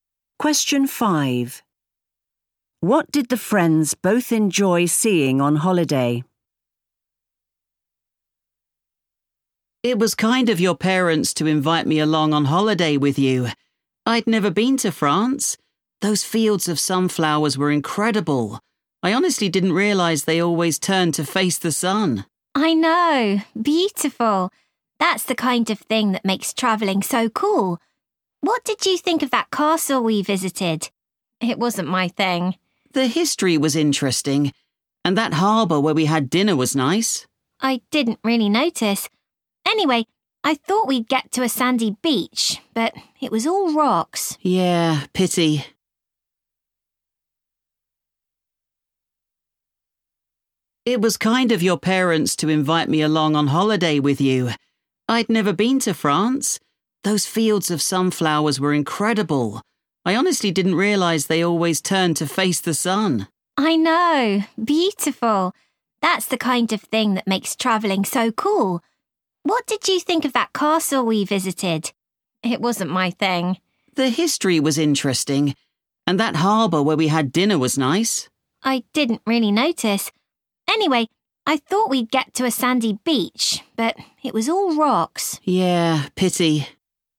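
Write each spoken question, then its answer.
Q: What did the friends both enjoy seeing on holiday?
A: The fields of sunflowers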